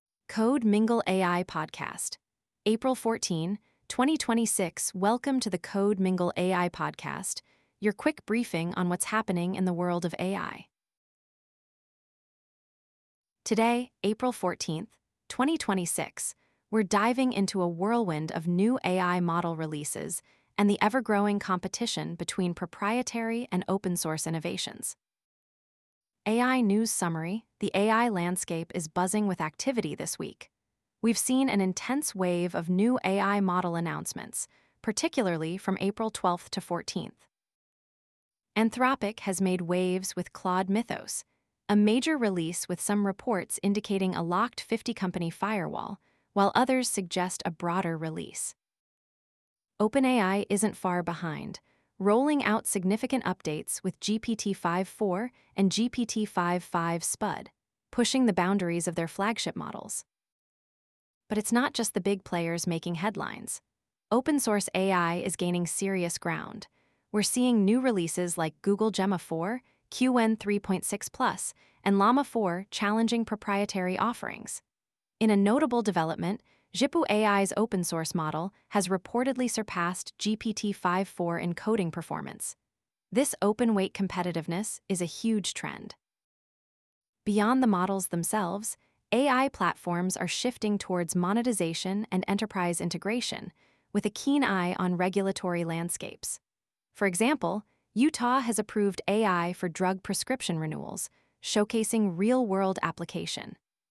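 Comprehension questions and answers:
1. Which open-source AI model was reported to have surpassed GPT-5.4 in coding performance?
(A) Google Gemma 4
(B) Llama 4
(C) Qwen 3.6 Plus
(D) Zhipu AI's open-source model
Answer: (D) Zhipu AI's open-source model

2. What specific application of AI in healthcare was approved in Utah?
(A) AI-driven surgical assistance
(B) AI for patient diagnosis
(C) AI in drug prescription renewals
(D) AI for personalized treatment plans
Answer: (C) AI in drug prescription renewals

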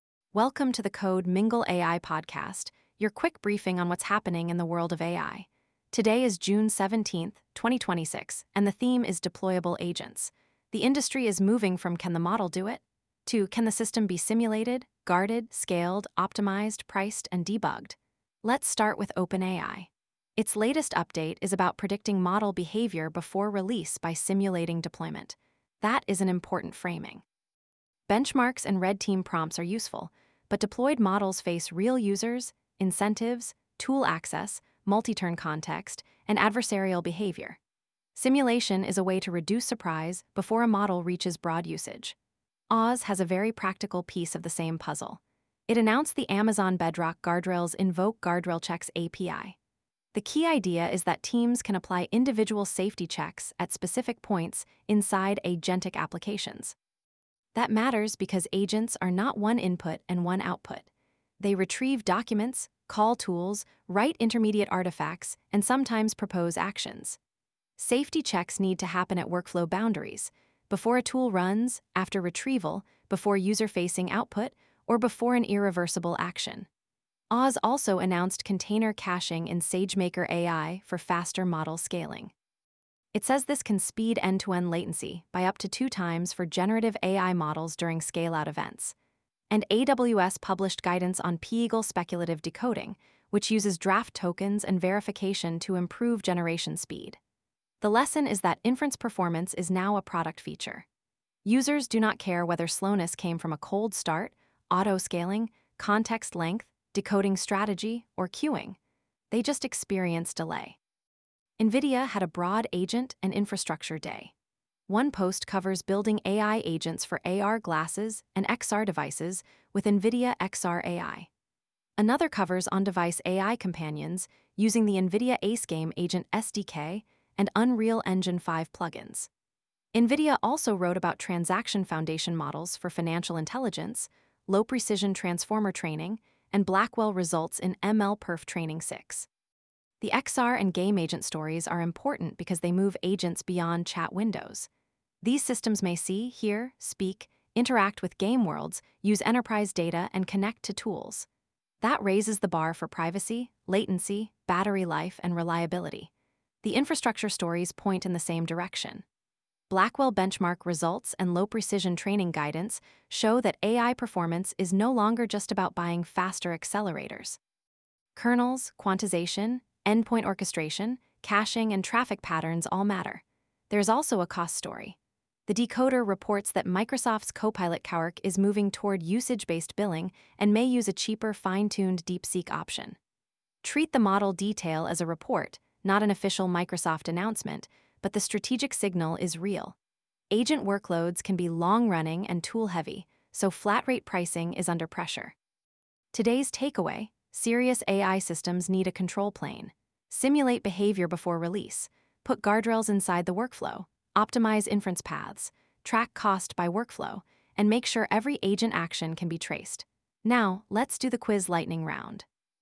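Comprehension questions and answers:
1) Why is OpenAI's deployment-simulation work important for production AI?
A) It shifts evaluation closer to realistic deployment behavior before broad release.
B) It replaces all user testing with a single benchmark score.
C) It is only about changing website copy.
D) It removes the need for monitoring after launch.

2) What is the key design advantage of AWS's Bedrock InvokeGuardrailChecks API for agents?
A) It lets teams apply safety checks at specific points inside an agent workflow.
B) It prevents agents from ever using retrieval.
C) It only speeds up image generation.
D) It removes the need to log agent actions.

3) What production problem does SageMaker container caching address?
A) It helps reduce end-to-end latency during model scale-out events.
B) It converts every model into a database.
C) It is only a documentation feature.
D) It blocks autoscaling for generative AI endpoints.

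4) Why do XR and on-device agents raise new engineering concerns?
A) They combine real-time interaction, rich sensor context, privacy constraints, and tight latency budgets.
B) They never need voice, vision, or environment data.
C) They are unrelated to model deployment.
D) They only run as static web pages.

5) What does Microsoft's reported move toward usage-based Copilot Cowork billing suggest about AI agents?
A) Agent workloads create cost pressure because usage can be long-running and tool-heavy.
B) AI agents are free to run at any scale.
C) Pricing models are unrelated to infrastructure cost.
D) All enterprises prefer one fixed model with no routing.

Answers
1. A) It shifts evaluation closer to realistic deployment behavior before broad release.
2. A) It lets teams apply safety checks at specific points inside an agent workflow.
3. A) It helps reduce end-to-end latency during model scale-out events.
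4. A) They combine real-time interaction, rich sensor context, privacy constraints, and tight latency budgets.
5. A) Agent workloads create cost pressure because usage can be long-running and tool-heavy.

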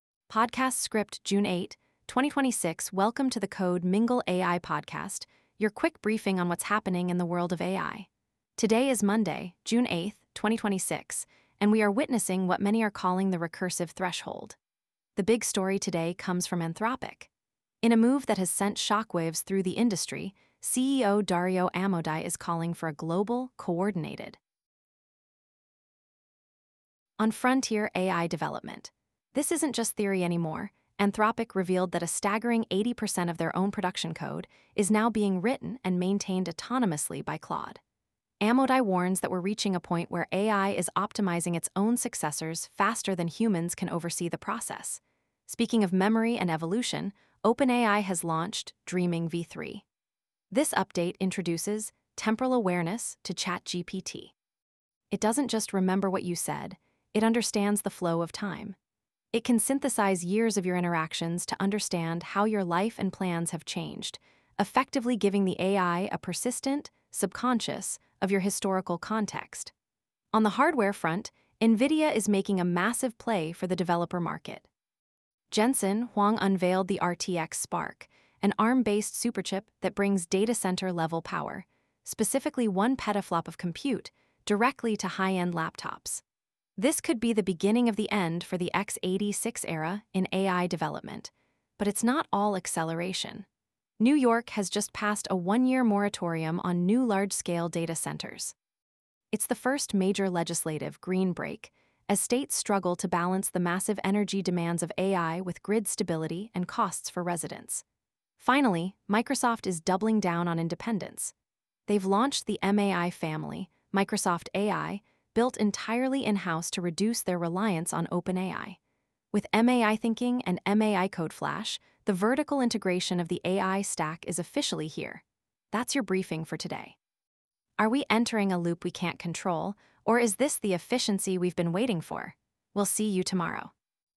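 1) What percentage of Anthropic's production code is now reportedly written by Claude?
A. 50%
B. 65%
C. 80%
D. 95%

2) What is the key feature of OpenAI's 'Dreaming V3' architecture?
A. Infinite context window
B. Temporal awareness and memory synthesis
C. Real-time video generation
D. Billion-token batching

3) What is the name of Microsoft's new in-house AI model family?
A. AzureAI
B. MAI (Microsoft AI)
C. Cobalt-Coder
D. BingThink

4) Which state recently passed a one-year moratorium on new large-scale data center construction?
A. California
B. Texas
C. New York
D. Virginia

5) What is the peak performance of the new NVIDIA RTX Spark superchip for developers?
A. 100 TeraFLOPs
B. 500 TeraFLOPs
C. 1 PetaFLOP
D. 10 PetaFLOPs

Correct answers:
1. C. 80%
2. B. Temporal awareness and memory synthesis
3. B. MAI (Microsoft AI)
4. C. New York
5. C. 1 PetaFLOP

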